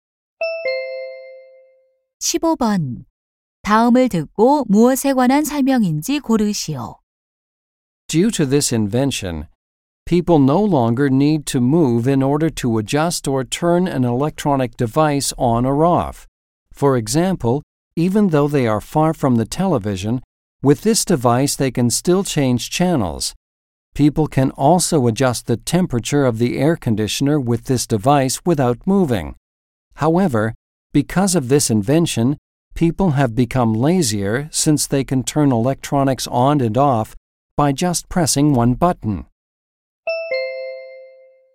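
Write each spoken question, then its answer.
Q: 다음을 듣고 무엇에 관한 설명인지 고르시오.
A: 리모컨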